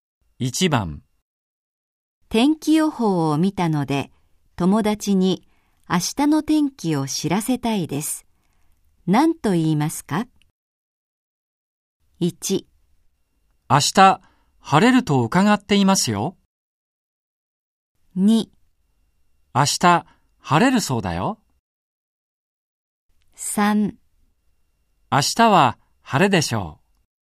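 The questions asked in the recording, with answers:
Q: 天気予報を見たので友達に明日の天気を知らせたいです。 何と言いますか?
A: 2: 明日晴れるそうだよ。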